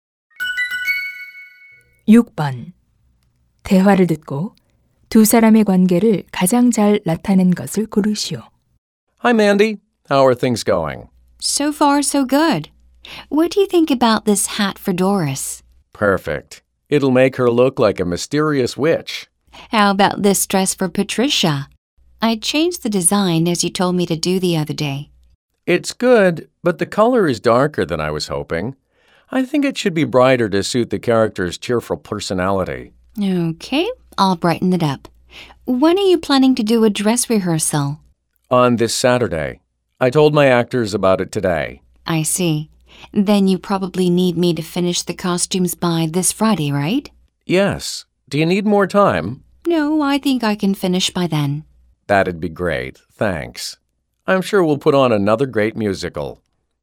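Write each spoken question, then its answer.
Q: 대화를 듣고 두 사람의 관계를 가장 잘 나타낸 것을 고르시오.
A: 의상 디자이너 - 뮤지컬 감독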